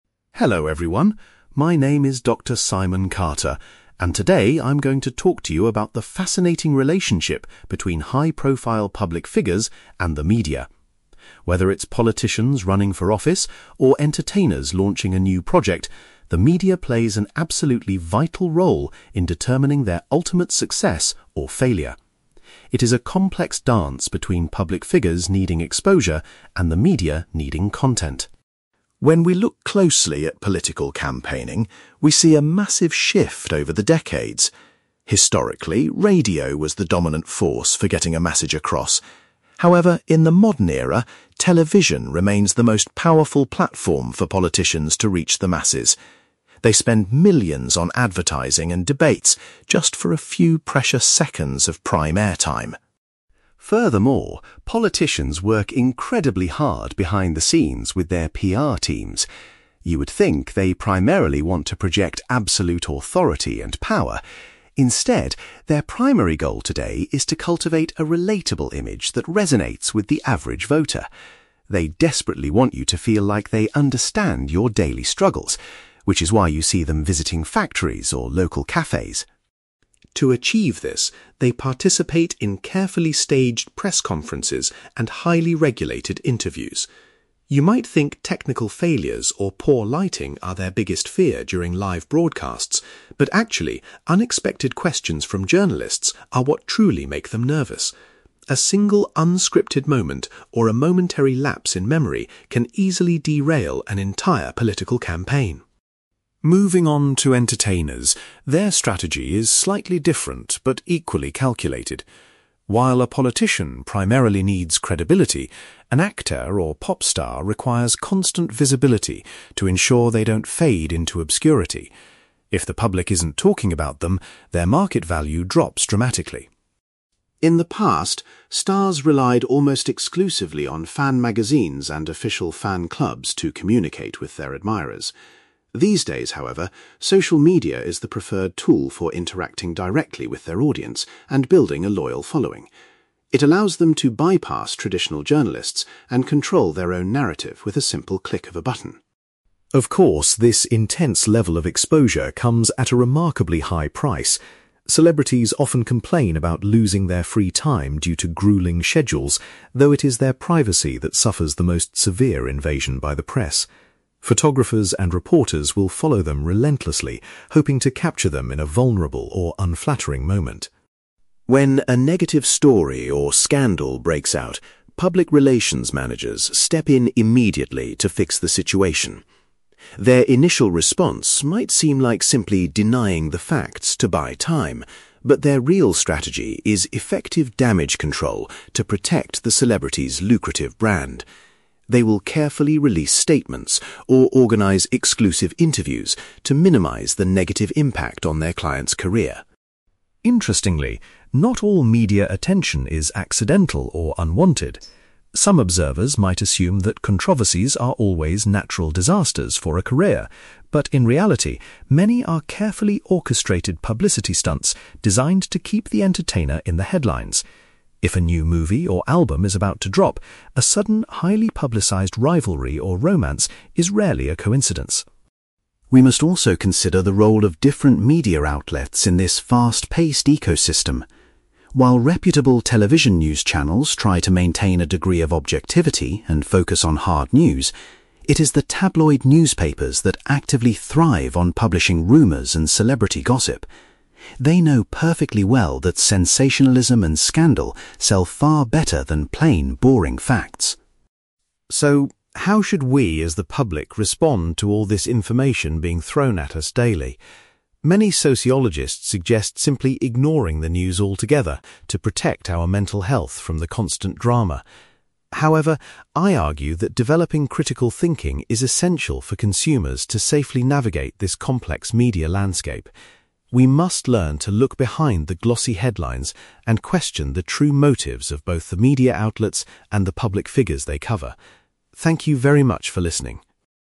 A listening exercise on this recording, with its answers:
You will hear a media analyst called Dr Simon Carter giving a presentation about how politicians and entertainers use the media. For questions 9-18, complete the sentences with a word or short phrase.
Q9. While radio was once dominant, Dr Carter claims that (9)........................... is currently the most effective medium for reaching voters.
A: television

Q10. Politicians collaborate with their PR teams to present a (10)........................... to the general public.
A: relatable image

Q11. During live broadcasts, politicians are most afraid of facing (11)........................... from reporters.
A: unexpected questions

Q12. To avoid being forgotten, entertainers rely heavily on (12)........................... in the media.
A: constant visibility

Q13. Nowadays, entertainers primarily use (13)........................... to communicate with their followers.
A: social media

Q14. Dr Carter points out that an entertainer's (14)........................... is frequently compromised by journalists.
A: privacy

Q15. When a scandal occurs, the main objective of PR managers is to carry out (15)........................... .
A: damage control

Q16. Dr Carter explains that some controversies are actually (16)........................... planned by the stars themselves.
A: publicity stunts

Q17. Rumors and gossip are primarily the focus of (17)........................... .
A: tabloid newspapers

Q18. Dr Carter believes that audiences need to use (18)........................... to understand the modern media environment.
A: critical thinking

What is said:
Dr Simon Carter : Hello everyone. My name is Dr. Simon Carter, and today I'm going to talk to you about the fascinating relationship between high-profile public figures and the media. Whether it's politicians running for office or entertainers launching a new project, the media plays an absolutely vital role in determining their ultimate success or failure. It is a complex dance between public figures needing exposure and the media needing content.
When we look closely at political campaigning, we see a massive shift over the decades. Historically, radio was the dominant force for getting a message across. However, in the modern era, television remains the most powerful platform for politicians to reach the masses. They spend millions on advertising and debates just for a few precious seconds of prime airtime.
Furthermore, politicians work incredibly hard behind the scenes with their PR teams. You would think they primarily want to project absolute authority and power; instead, their primary goal today is to cultivate a relatable image that resonates with the average voter. They desperately want you to feel like they understand your daily struggles, which is why you see them visiting factories or local cafes.
To achieve this, they participate in carefully staged press conferences and highly regulated interviews. You might think technical failures or poor lighting are their biggest fear during live broadcasts, but actually, unexpected questions from journalists are what truly make them nervous. A single unscripted moment or a momentary lapse in memory can easily derail an entire political campaign.
Moving on to entertainers, their strategy is slightly different but equally calculated. While a politician primarily needs credibility, an actor or pop star requires constant visibility to ensure they don't fade into obscurity. If the public isn't talking about them, their market value drops dramatically.
In the past, stars relied almost exclusively on fan magazines and official fan clubs to communicate with their admirers. These days, however, social media is the preferred tool for interacting directly with their audience and building a loyal following. It allows them to bypass traditional journalists and control their own narrative with a simple click of a button.
Of course, this intense level of exposure comes at a remarkably high price. Celebrities often complain about losing their free time due to grueling schedules, though it is their privacy that suffers the most severe invasion by the press. Photographers and reporters will follow them relentlessly, hoping to capture them in a vulnerable or unflattering moment.
When a negative story or scandal breaks out, public relations managers step in immediately to fix the situation. Their initial response might seem like simply denying the facts to buy time, but their real strategy is effective damage control to protect the celebrity's lucrative brand. They will carefully release statements or organize exclusive interviews to minimize the negative impact on their client's career.
Interestingly, not all media attention is accidental or unwanted. Some observers might assume that controversies are always natural disasters for a career, but in reality, many are carefully orchestrated publicity stunts designed to keep the entertainer in the headlines. If a new movie or album is about to drop, a sudden, highly publicized rivalry or romance is rarely a coincidence.
We must also consider the role of different media outlets in this fast-paced ecosystem. While reputable television news channels try to maintain a degree of objectivity and focus on hard news, it is the tabloid newspapers that actively thrive on publishing rumors and celebrity gossip. They know perfectly well that sensationalism and scandal sell far better than plain, boring facts.
So, how should we as the public respond to all this information being thrown at us daily? Many sociologists suggest simply ignoring the news altogether to protect our mental health from the constant drama. However, I argue that developing critical thinking is essential for consumers to safely navigate this complex media landscape. We must learn to look behind the glossy headlines and question the true motives of both the media outlets and the public figures they cover. Thank you very much for listening.

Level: B2